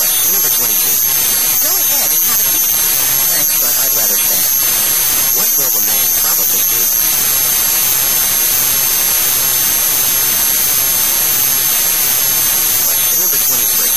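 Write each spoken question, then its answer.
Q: What will the man probably do?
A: Remain standing.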